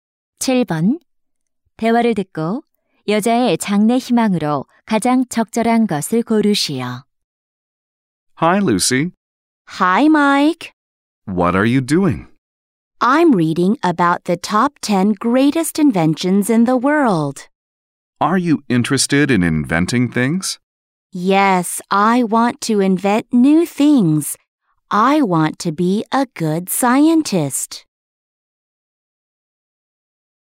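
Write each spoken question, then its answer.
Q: 대화를 듣고 여자의 장래 희망으로 가장 적절한 것을 고르시오.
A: 과학자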